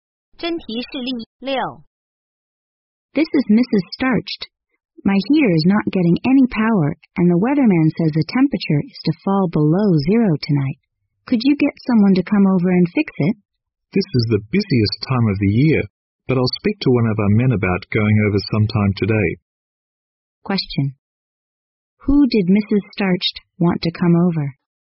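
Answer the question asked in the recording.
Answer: A repairman to fix her heater.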